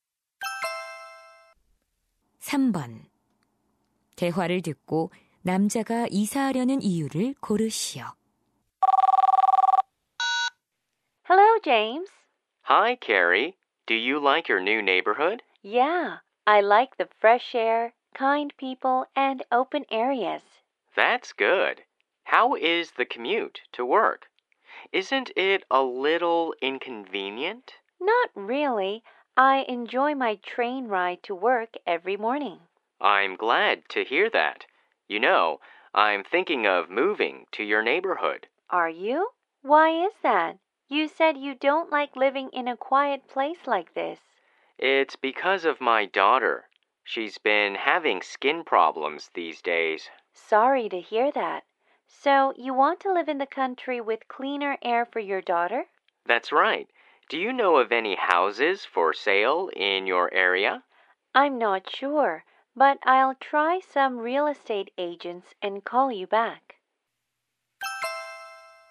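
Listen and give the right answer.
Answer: 딸의 피부 문제 때문에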